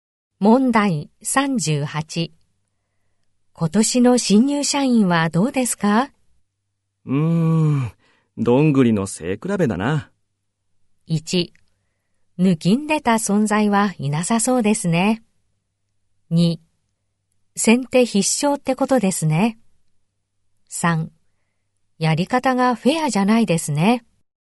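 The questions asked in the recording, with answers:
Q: 今年の新入社員はどうですか?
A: 1: 抜きんでた存在はいなさそうですね。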